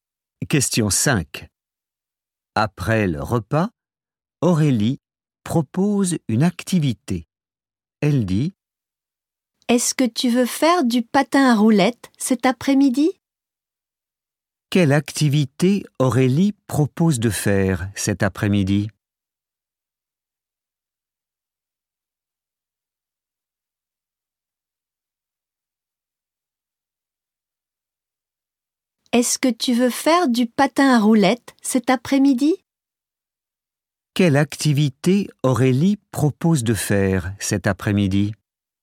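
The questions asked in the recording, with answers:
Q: Quelle activité Aurélie propose de faire cet après-midi?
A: Du patin à roulettes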